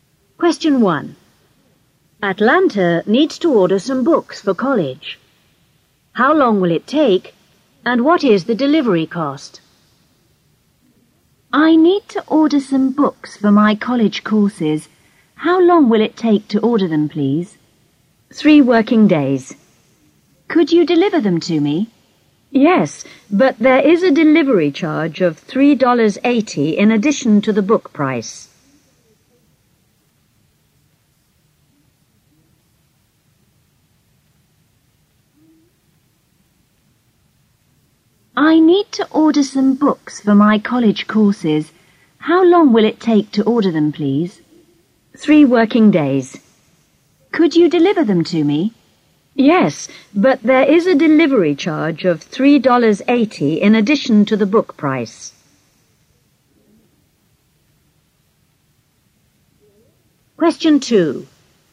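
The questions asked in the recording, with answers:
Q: How long will it take, and what is the delivery cost?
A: 3 working days; $3.80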